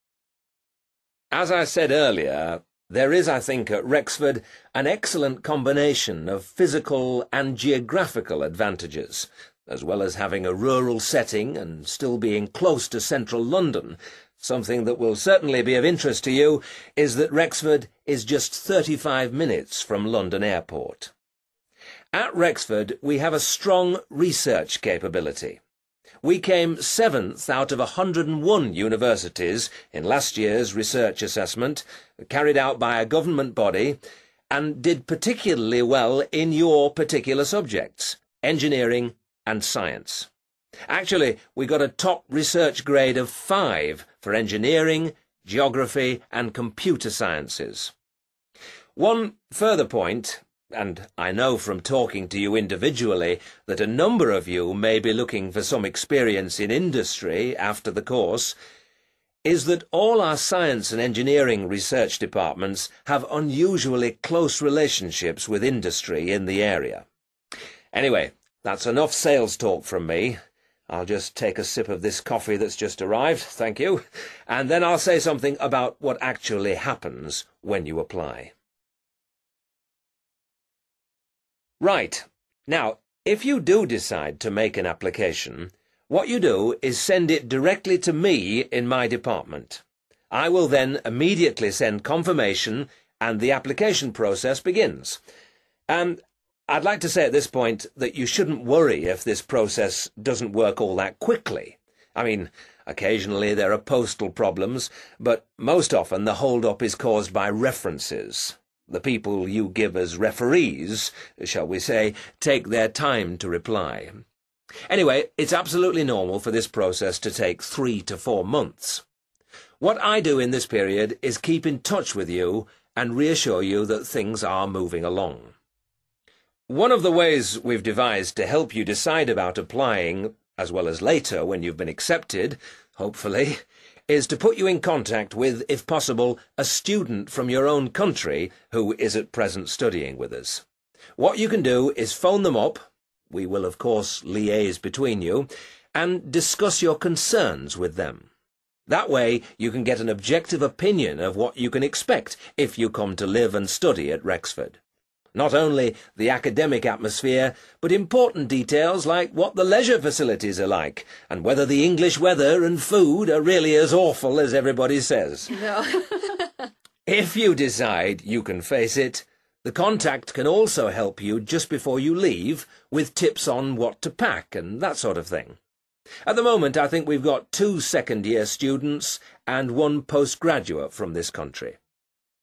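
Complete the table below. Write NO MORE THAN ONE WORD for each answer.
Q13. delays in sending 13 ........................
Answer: references

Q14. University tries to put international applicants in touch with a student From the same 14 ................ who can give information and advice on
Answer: country

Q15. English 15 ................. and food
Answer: weather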